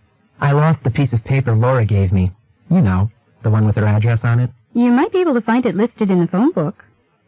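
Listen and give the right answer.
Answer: The man may find Laura's address in the phone book.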